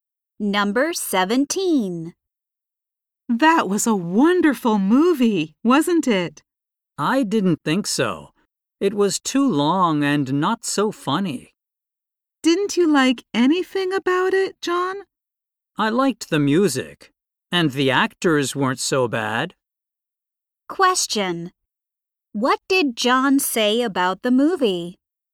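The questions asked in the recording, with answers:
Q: What did John say about the movie?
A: It was too long and not so funny, but he liked the music.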